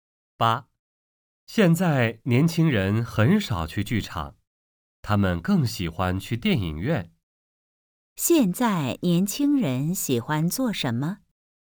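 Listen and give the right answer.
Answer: 去电影院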